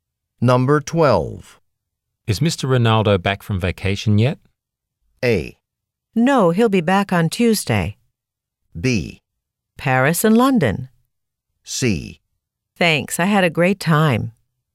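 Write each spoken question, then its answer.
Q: Is Mr. Ronaldo back from vacation yet?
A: A: No, he'll be back on Tuesday.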